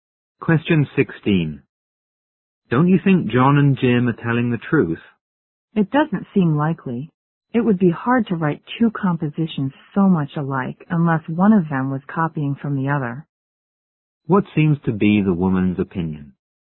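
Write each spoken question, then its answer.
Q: What seems to be the woman's opinion?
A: One of them copied the other's composition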